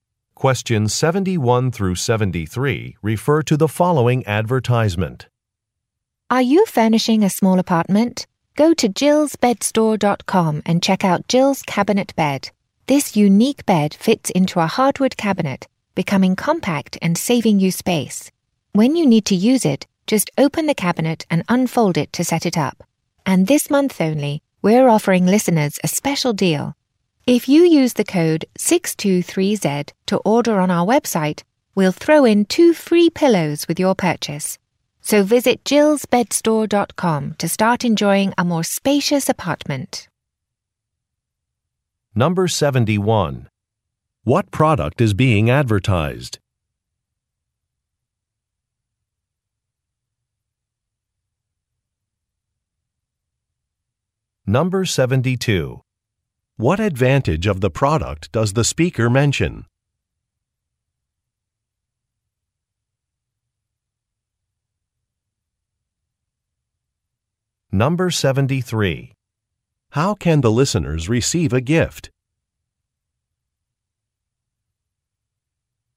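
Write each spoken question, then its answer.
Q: What product is being advertised?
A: A bed that folds into a cabinet

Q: What advantage of the product does the speaker mention?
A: It saves space

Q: How can the listeners receive a gift?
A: By using a code to order on the website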